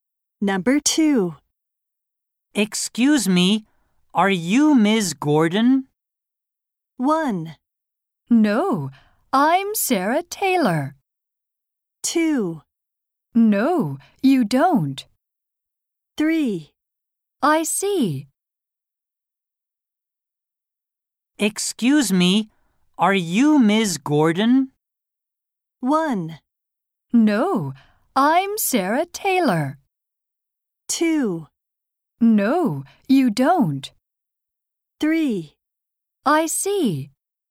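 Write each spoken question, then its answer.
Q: Excuse me, are you Ms. Gordon?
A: 1: No, I'm Sarah Taylor.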